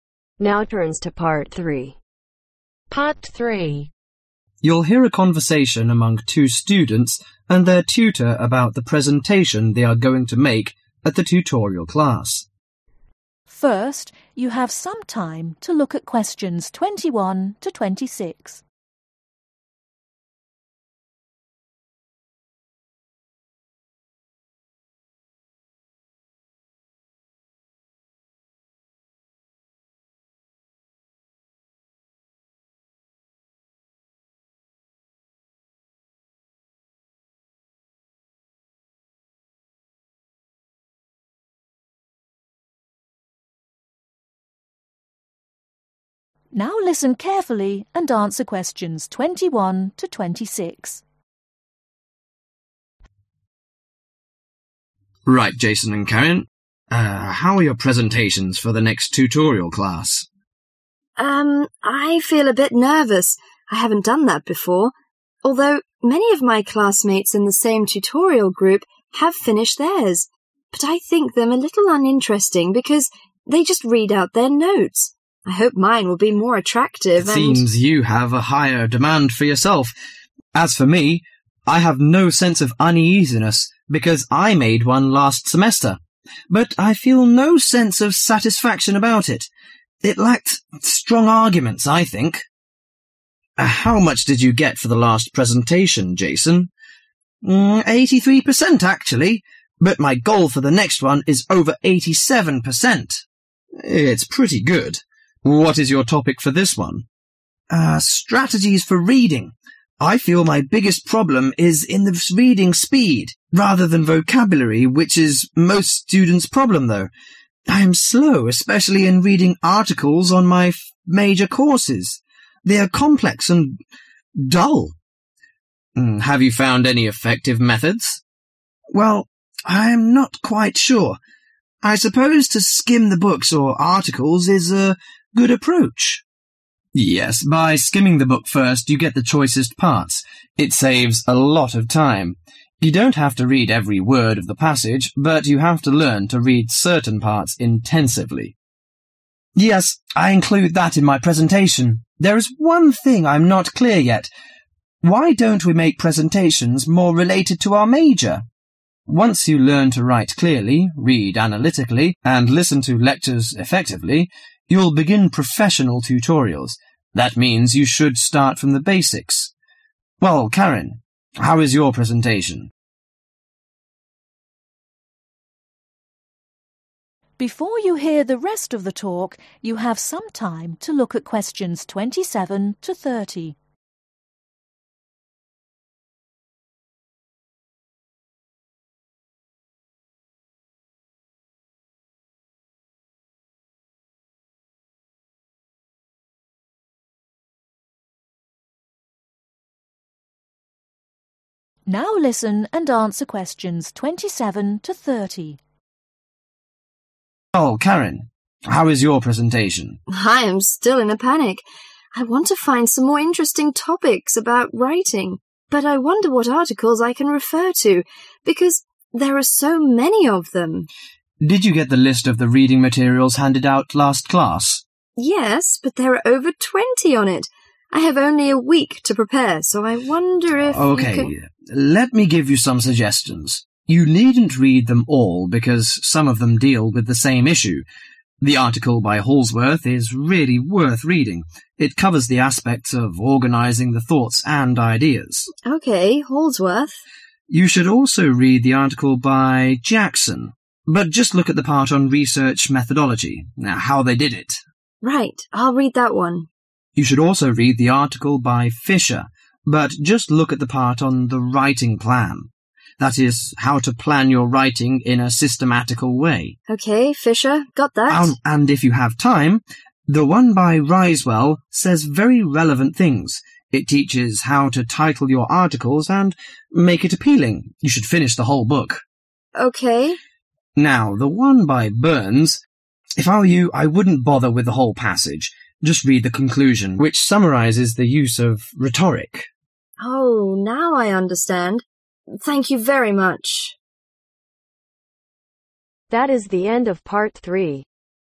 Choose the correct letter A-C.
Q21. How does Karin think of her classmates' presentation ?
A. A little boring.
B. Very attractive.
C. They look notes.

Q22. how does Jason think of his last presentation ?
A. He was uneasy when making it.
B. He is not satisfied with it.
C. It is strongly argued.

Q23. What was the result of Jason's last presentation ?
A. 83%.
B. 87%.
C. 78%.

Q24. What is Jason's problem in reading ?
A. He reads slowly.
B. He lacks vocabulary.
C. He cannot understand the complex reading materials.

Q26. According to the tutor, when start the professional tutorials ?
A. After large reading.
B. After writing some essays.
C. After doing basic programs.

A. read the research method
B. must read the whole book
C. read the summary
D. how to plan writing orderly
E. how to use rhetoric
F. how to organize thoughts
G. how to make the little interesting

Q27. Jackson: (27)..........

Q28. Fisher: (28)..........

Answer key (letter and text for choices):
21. A. A little boring.
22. B. He is not satisfied with it.
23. A. 83%.
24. A. He reads slowly.
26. C. After doing basic programs.
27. A. read the research method
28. D. how to plan writing orderly